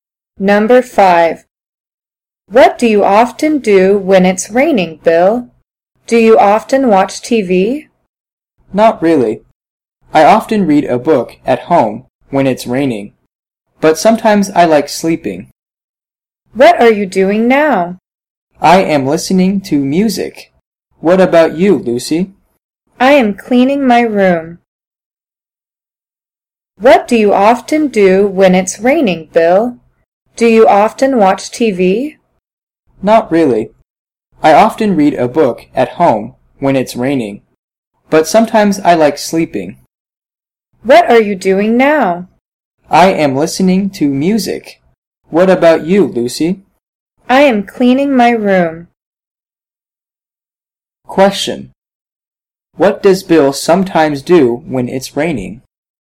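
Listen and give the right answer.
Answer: He sleeps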